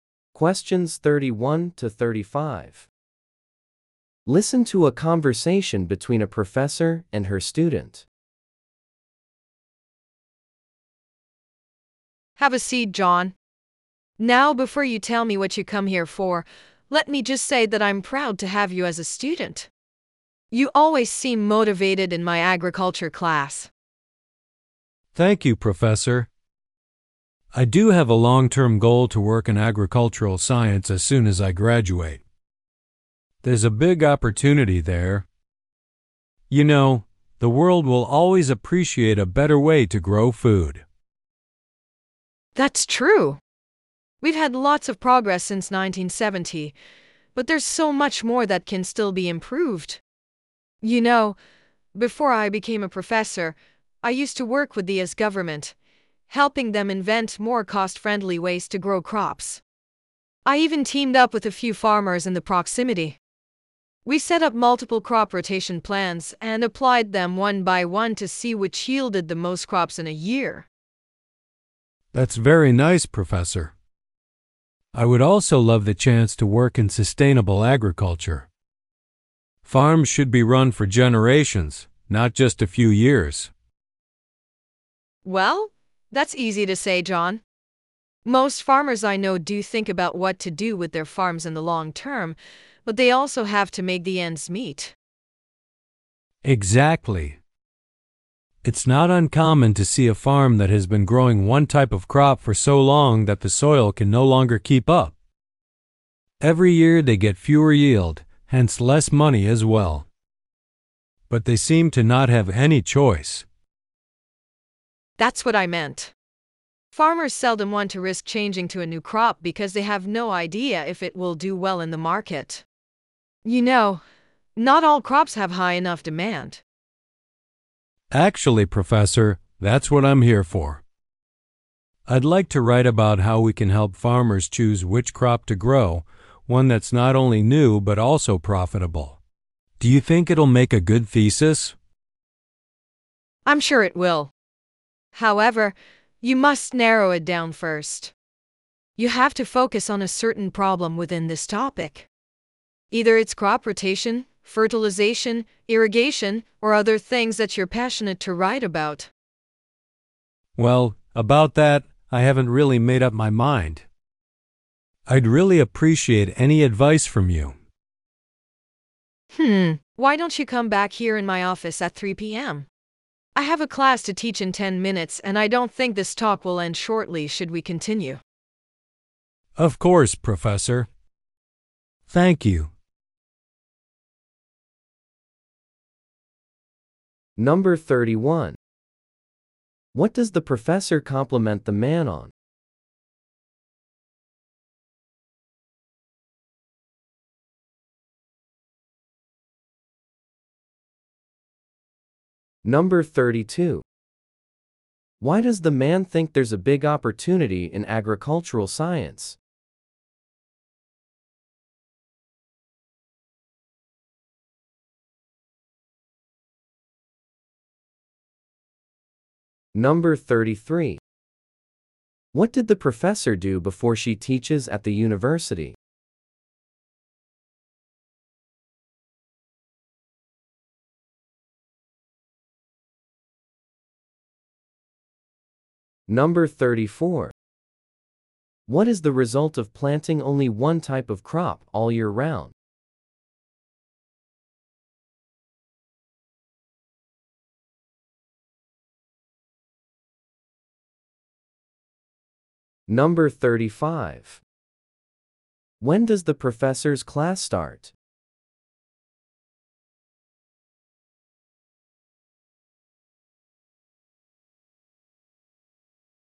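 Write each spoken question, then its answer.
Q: What does the professor compliment the man on?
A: He always seems motivated in her agriculture class

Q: Why does the man think there's a big opportunity in agricultural science?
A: The world will always appreciate a better way to grow food

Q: What did the professor do before she teaches at the university?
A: She worked with the US government to invent cheaper ways to grow crops

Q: What is the result of planting only one type of crop all year round?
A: The soil wears out, so yields and income fall every year

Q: When does the professor's class start?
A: In 10 minutes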